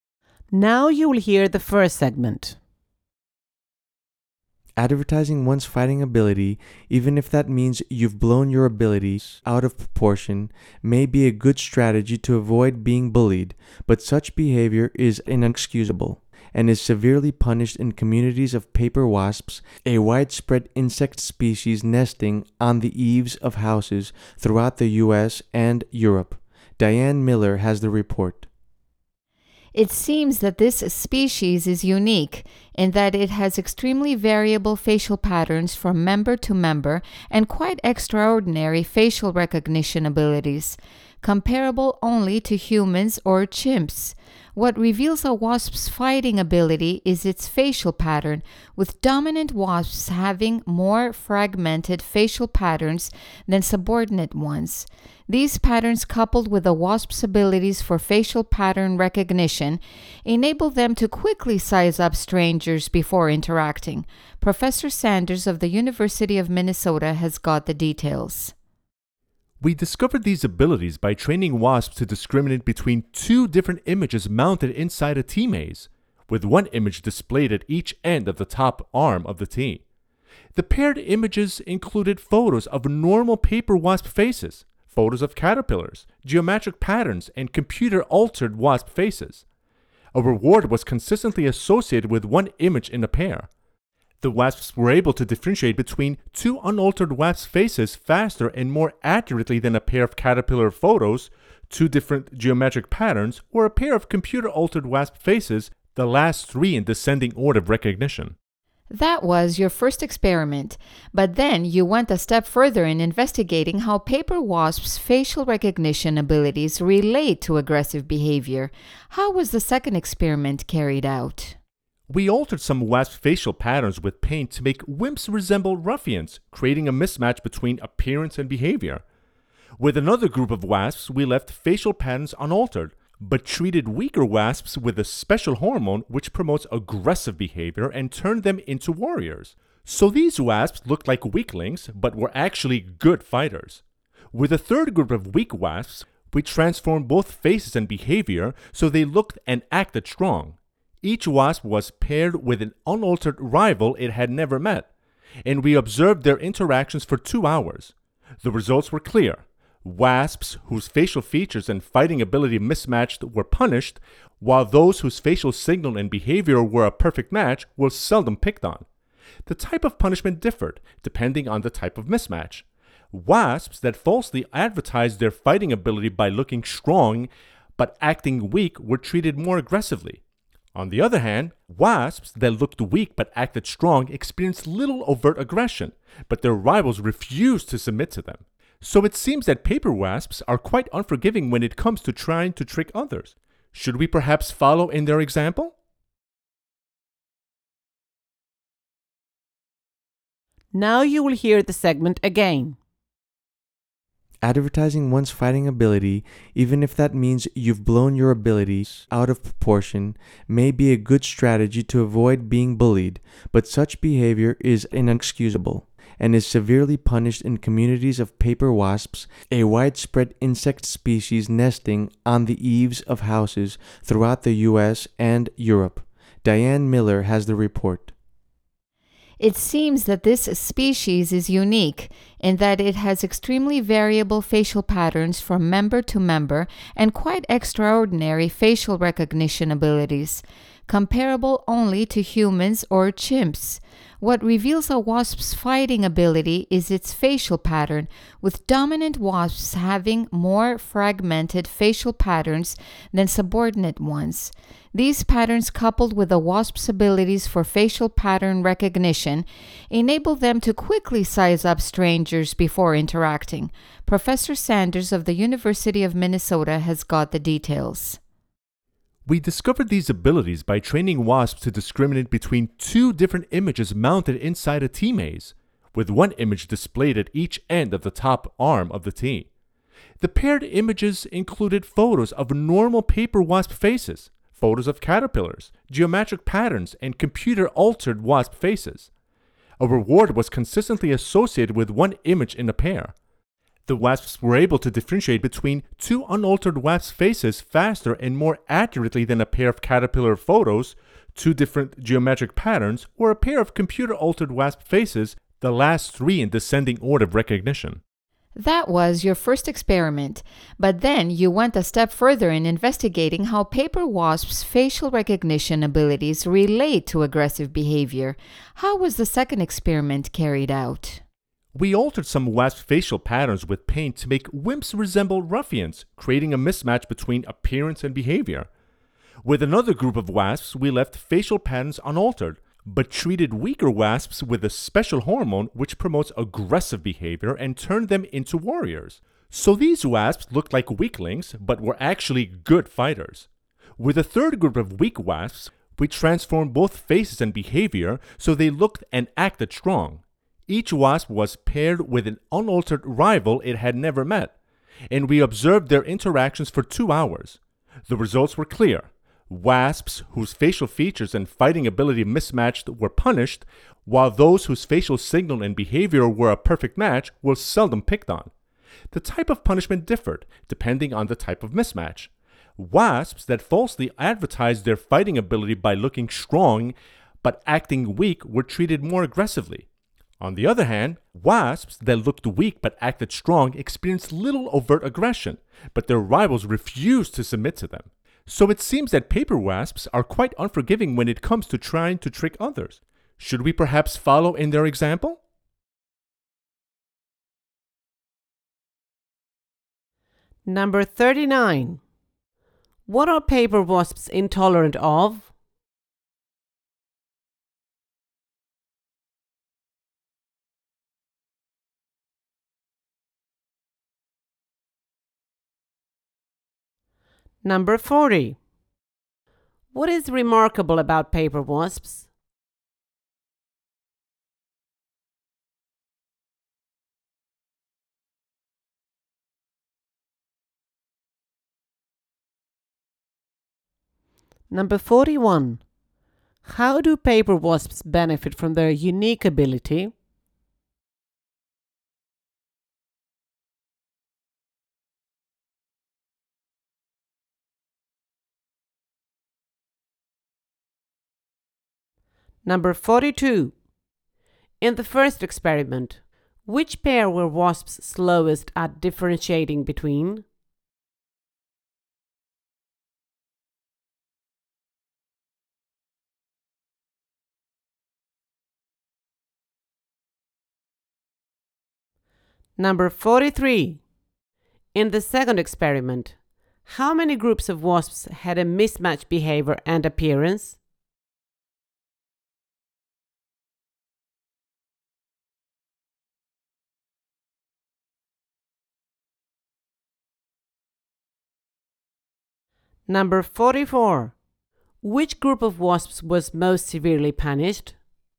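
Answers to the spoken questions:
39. Wasps that falsely advertise their fighting ability (trying to trick others)
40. Their extraordinary facial recognition abilities, comparable to humans or chimps
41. They can quickly size up strangers before interacting
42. A pair of computer-altered wasp faces
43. Two
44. Wasps that looked strong but acted weak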